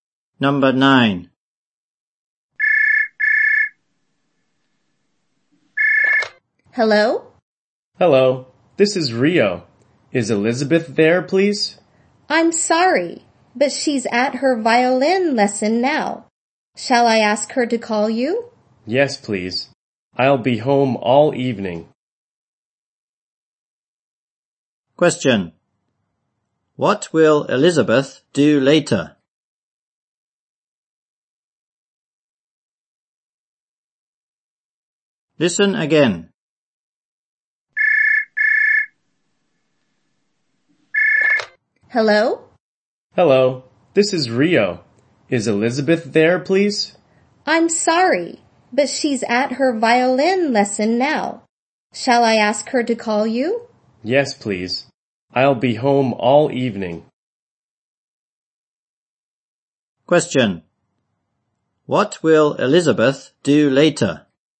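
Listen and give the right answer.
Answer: She will call Rio.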